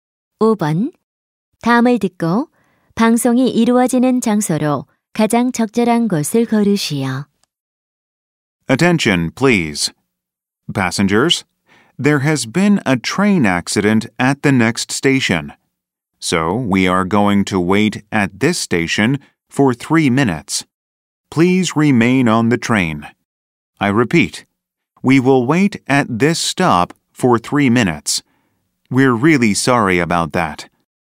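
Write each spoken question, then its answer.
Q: 다음을 듣고 방송이 이루어지는 장소로 가장 적절한 곳을 고르시오.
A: 기차 안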